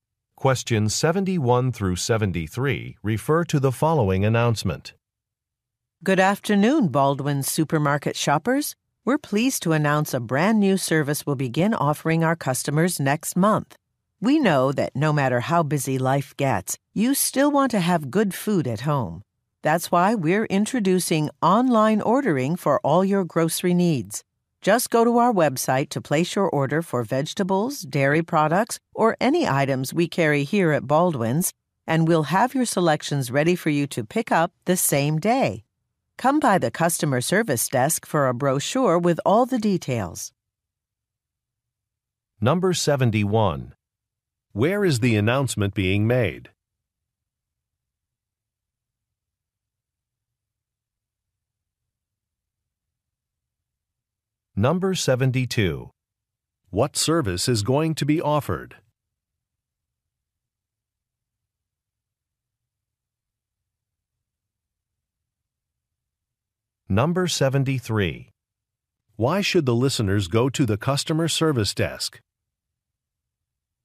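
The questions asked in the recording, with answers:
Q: Where is the announcement being made?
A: At a supermarket

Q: What service is going to be offered?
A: Online grocery ordering

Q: Why should the listeners go to the customer service desk?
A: To get a brochure with details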